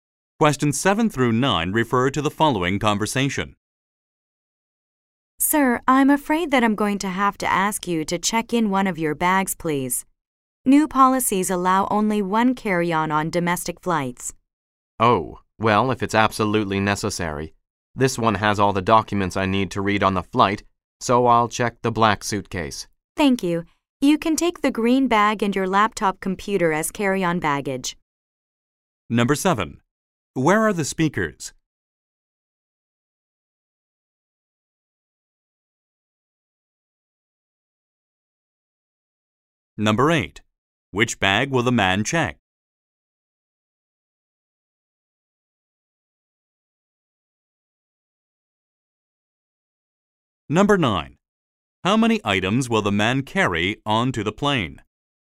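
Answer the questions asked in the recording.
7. At an airport
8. The black suitcase
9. Two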